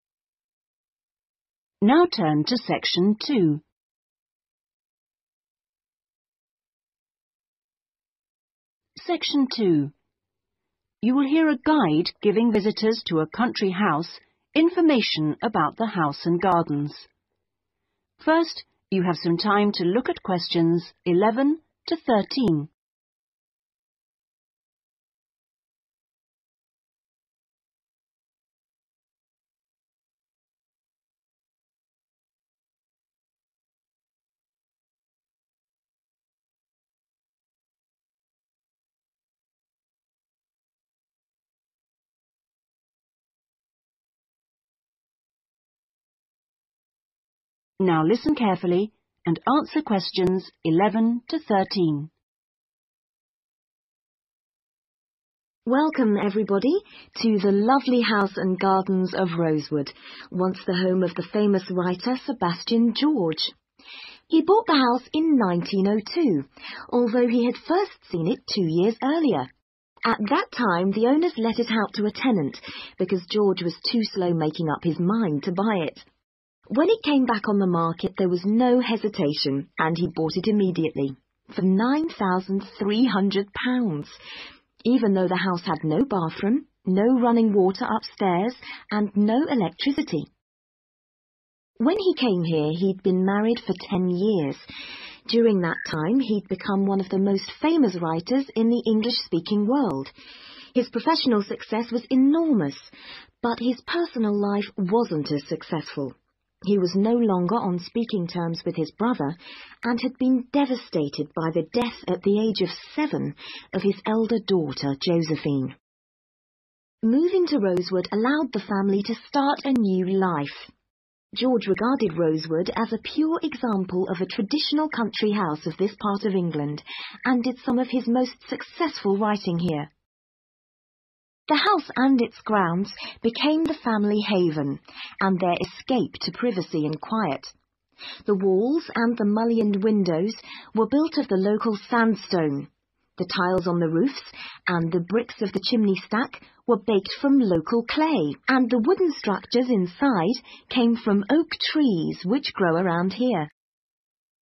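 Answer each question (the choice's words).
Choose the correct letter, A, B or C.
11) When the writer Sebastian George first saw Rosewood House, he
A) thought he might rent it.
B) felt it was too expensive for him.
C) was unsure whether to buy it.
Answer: was unsure whether to buy it.

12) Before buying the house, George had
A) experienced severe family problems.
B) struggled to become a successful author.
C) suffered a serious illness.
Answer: experienced severe family problems.

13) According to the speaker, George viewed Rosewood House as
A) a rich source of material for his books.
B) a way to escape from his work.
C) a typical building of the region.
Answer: a typical building of the region.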